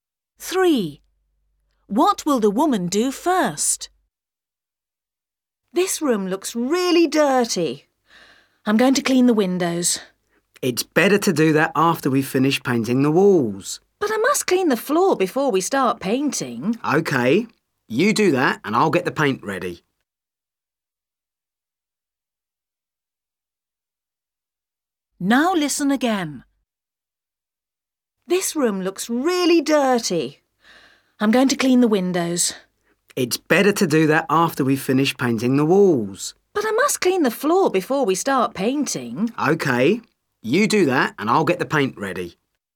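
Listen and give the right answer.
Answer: clean the floor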